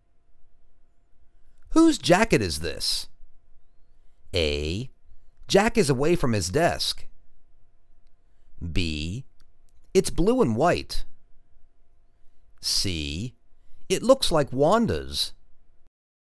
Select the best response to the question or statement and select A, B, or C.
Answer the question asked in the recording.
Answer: It looks like Wanda's.